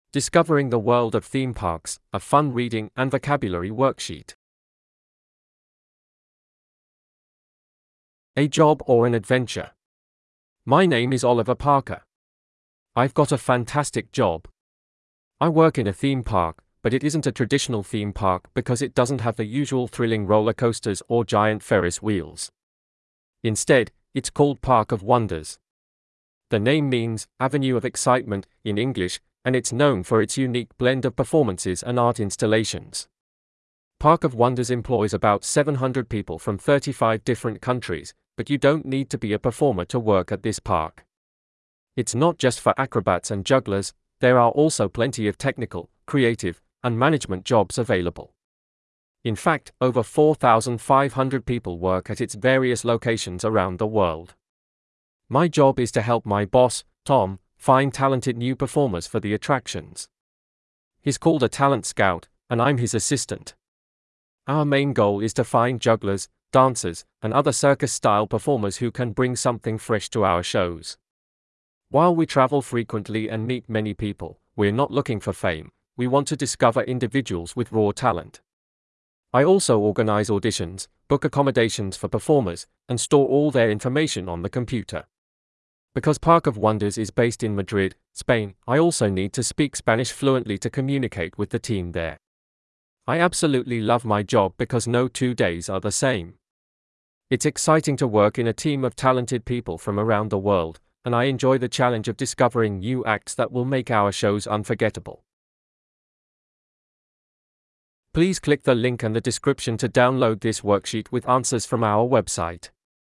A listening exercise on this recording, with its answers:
B. Read the text again and write true (T), false (F), or doesn't say (DS).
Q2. Park of Wonders employs 4500 performers.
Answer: F

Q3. Park of Wonders has attractions in different countries.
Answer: T

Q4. Oliver earns a large salary.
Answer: DS

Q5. He has to use a computer in his job.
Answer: T

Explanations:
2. Park of Wonders employs 4500 people, not all performers.
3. Park of Wonders has attractions worldwide.
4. Salary is not mentioned in the text.
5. Oliver uses a computer to store performer details.

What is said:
A JOB OR AN ADVENTURE
My name is Oliver Parker. I've got a fantastic job. I work in a theme park, but it isn't a traditional theme park because it doesn't have the usual thrilling roller coasters or giant Ferris wheels. Instead, it's called Park of Wonders. The name means "Avenue of Excitement" in English, and it's known for its unique blend of performances and art installations. Park of Wonders employs about 700 people from 35 different countries, but you don't need to be a performer to work at this park. It's not just for acrobats and jugglers—there are also plenty of technical, creative, and management jobs available. In fact, over 4500 people work at its various locations around the world.
My job is to help my boss, Tom, find talented new performers for the attractions. He's called a talent scout, and I'm his assistant. Our main goal is to find jugglers, dancers, and other circus-style performers who can bring something fresh to our shows. While we travel frequently and meet many people, we're not looking for fame; we want to discover individuals with raw talent. I also organize auditions, book accommodations for performers, and store all their information on the computer. Because Park of Wonders is based in Madrid, Spain, I also need to speak Spanish fluently to communicate with the team there.
I absolutely love my job because no two days are the same. It's exciting to work in a team of talented people from around the world, and I enjoy the challenge of discovering new acts that will make our shows unforgettable.

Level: Pre Intermediate